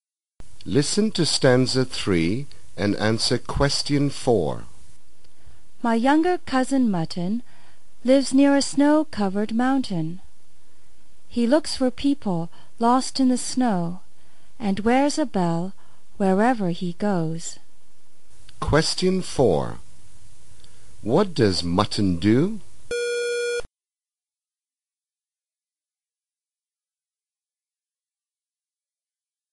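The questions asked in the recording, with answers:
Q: What does Mutton do?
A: He looks for people lost in the snow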